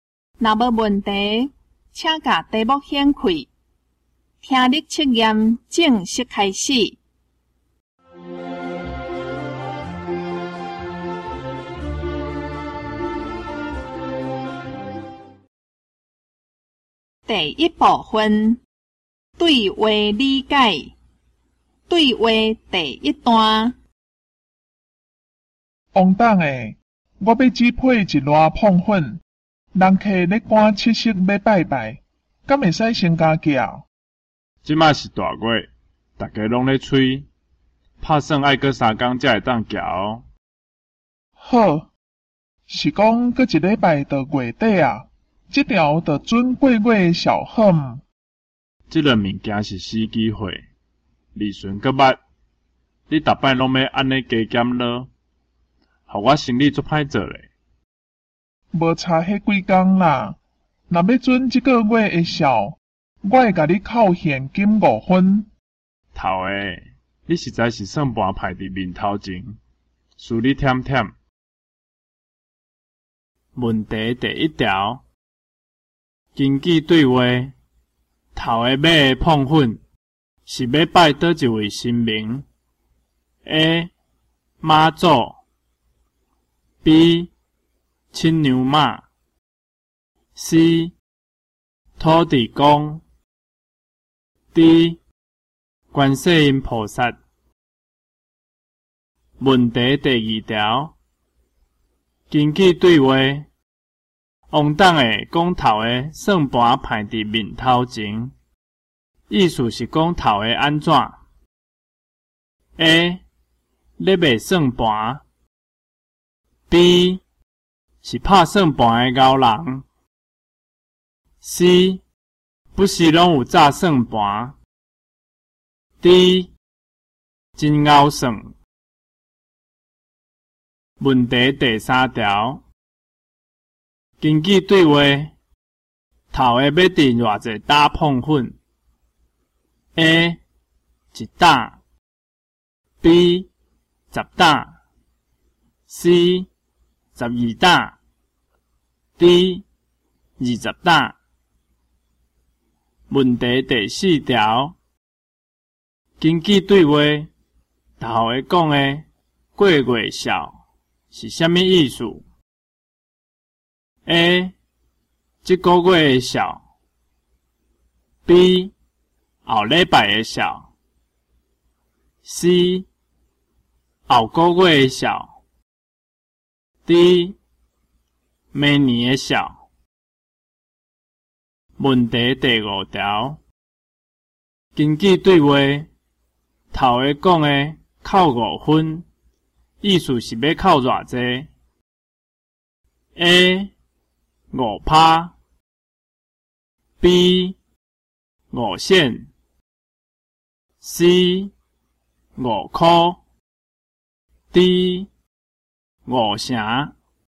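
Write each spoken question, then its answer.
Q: 根据对话。王董的讲头的算盘排伫面头前,意思是讲头的安怎 ?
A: D: 真敖算

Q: 根据对话,头下讲的过月少是啥物意思?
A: C: 后个月的小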